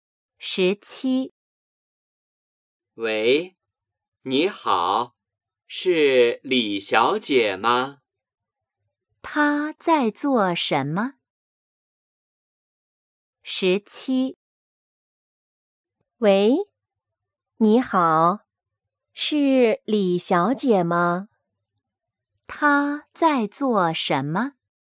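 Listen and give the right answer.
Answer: 打电话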